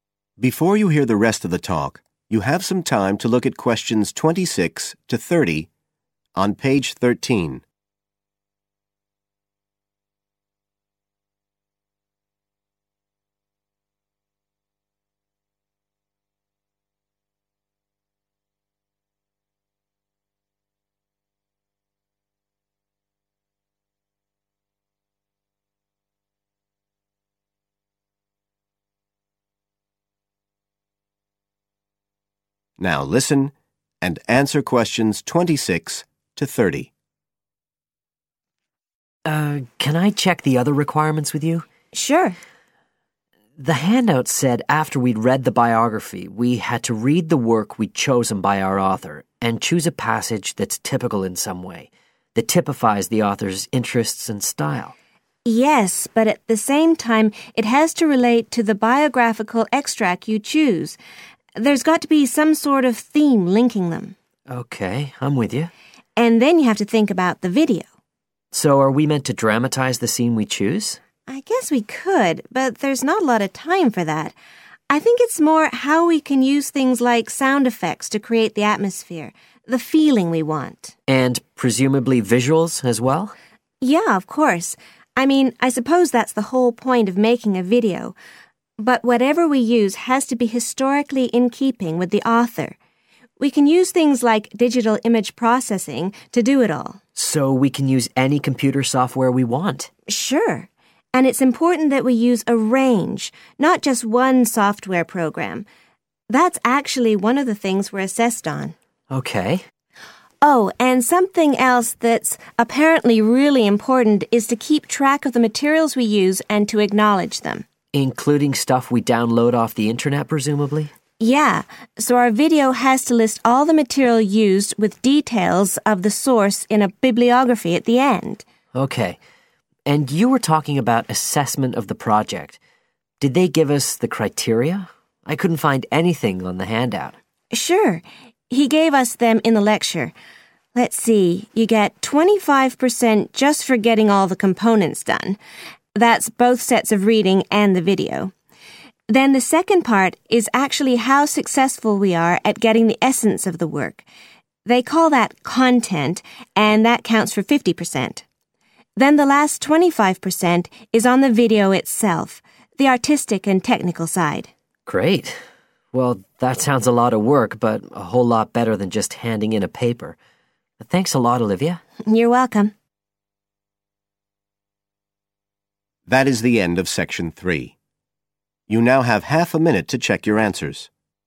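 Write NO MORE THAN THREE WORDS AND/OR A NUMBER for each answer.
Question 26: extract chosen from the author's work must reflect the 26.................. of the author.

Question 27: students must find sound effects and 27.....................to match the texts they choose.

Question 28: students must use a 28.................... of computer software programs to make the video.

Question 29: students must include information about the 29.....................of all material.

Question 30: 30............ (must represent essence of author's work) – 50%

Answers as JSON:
{"26": "interests and style", "27": "visuals", "28": "range", "29": "source", "30": "content"}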